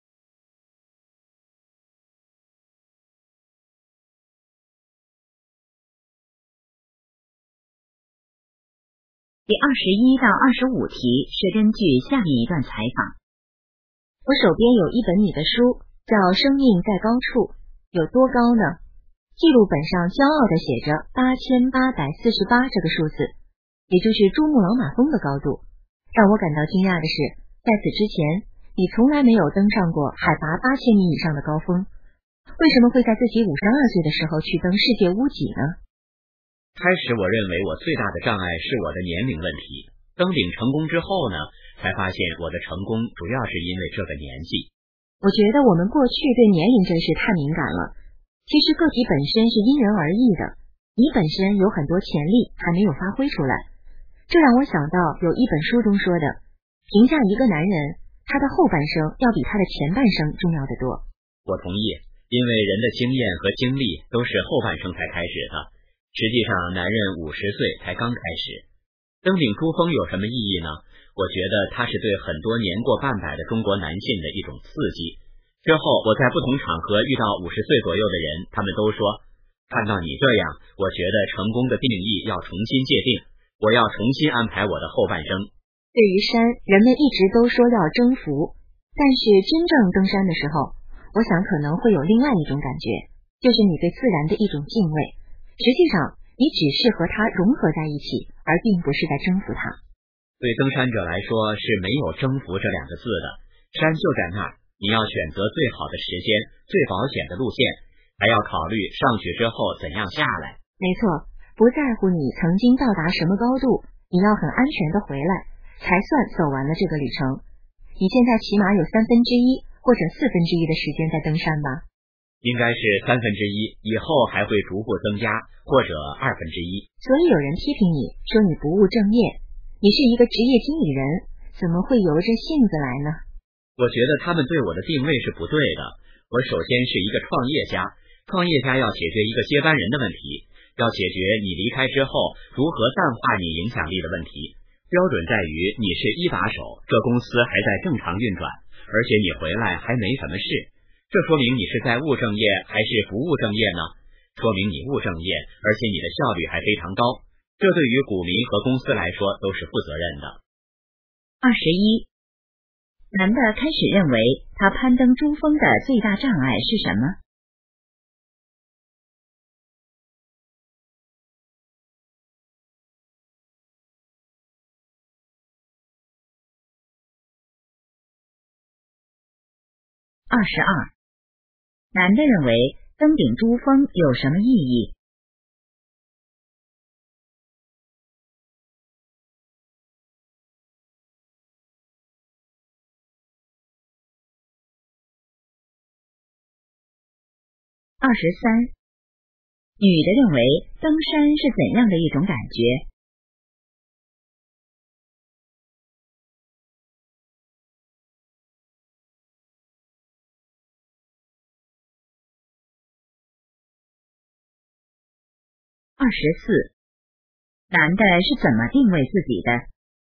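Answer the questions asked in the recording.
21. 年龄
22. 对年过半百的中国男性是一种刺激
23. 对自然的敬畏,与山融合而不是征服
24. 创业家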